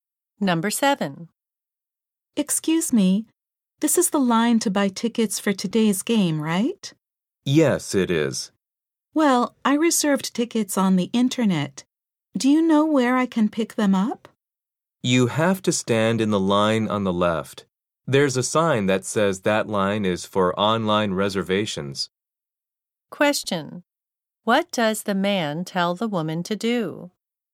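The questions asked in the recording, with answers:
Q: What does the man tell the woman to do?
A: Stand in the line on the left for online reservations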